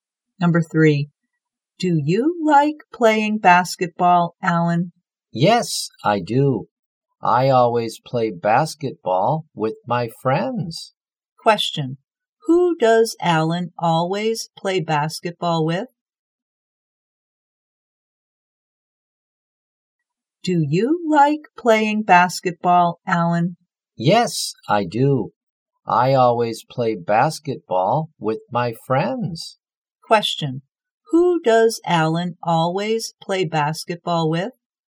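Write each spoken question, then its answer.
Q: Who does Alan always play basketball with?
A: His friends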